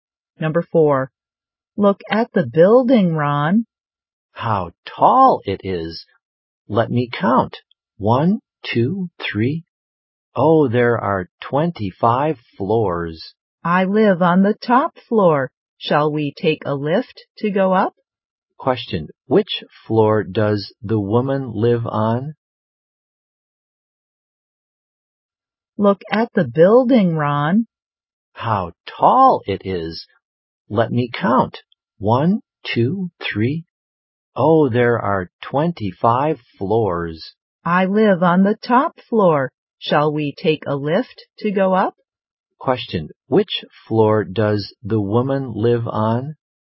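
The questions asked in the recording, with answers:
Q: Which floor does the woman live on?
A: The 25th floor (the top floor)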